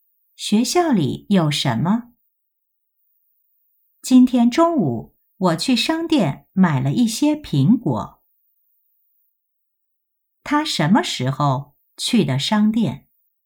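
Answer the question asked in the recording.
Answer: 今天中午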